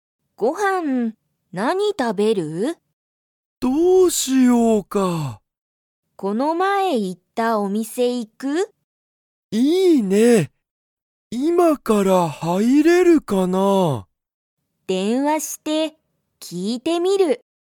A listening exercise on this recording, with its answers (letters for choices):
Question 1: サキは、____お店みせに行いきたい。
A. 今終いまおわった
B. 電話でんわがない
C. この前行まえいった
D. こんな時間じかんの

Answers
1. C

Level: Level 1